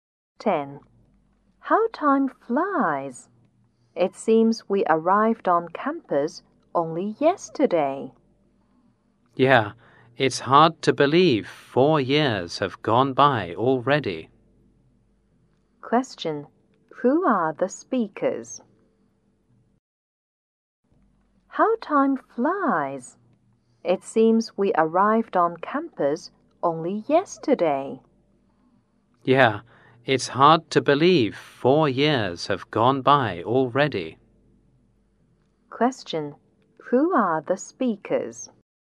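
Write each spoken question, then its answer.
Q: Question. Who are the speakers?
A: College students about to graduate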